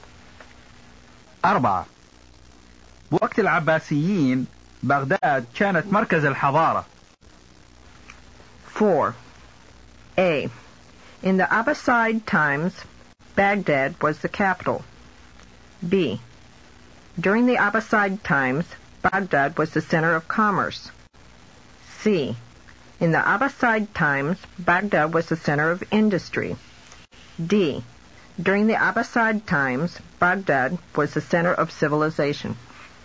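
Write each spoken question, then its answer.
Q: بوقت العباسيين بغداد كانت مركز الحضارة.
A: D: During the Abbasid times, Baghdad was the center of civilization.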